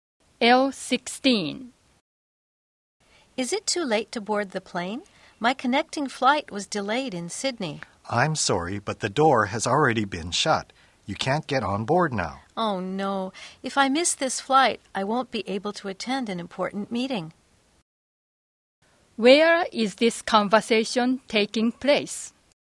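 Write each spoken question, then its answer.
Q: Where is this conversation taking place?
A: At an airport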